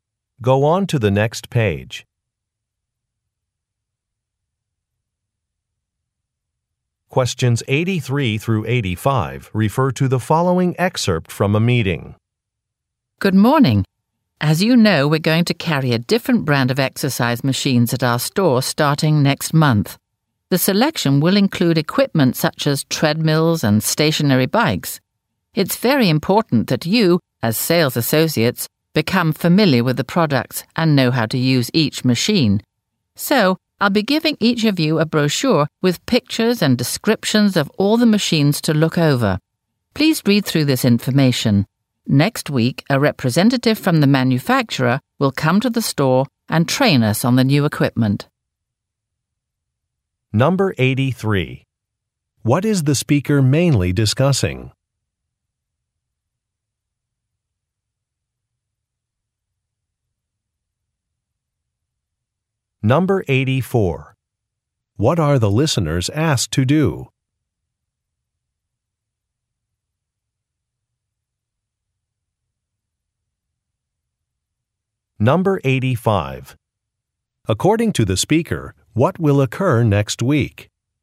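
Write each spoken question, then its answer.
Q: What is the speaker mainly discussing?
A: A new brand of exercise machines the store will carry

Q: What are the listeners asked to do?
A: Read a brochure about the machines

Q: According to the speaker, what will occur next week?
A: A manufacturer representative will train staff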